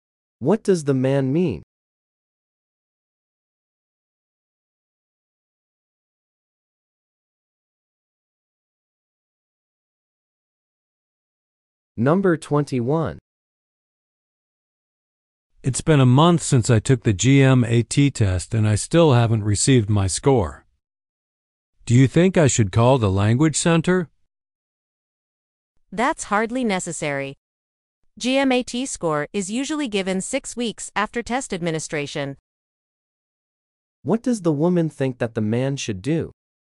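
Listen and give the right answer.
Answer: Wait for the score instead of calling.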